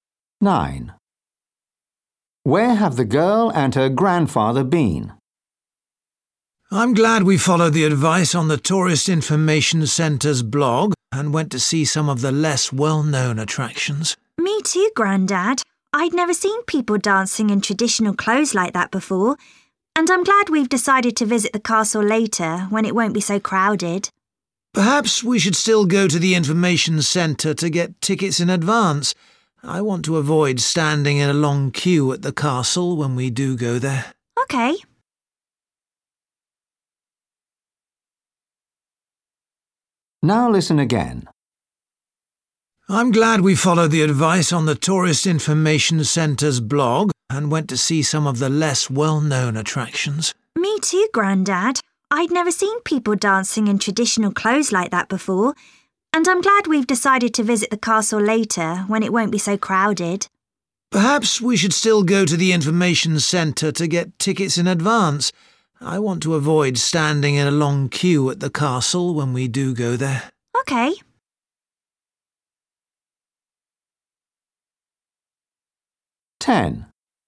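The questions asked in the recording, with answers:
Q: Where have the girl and her grandfather been?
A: to see traditional dancing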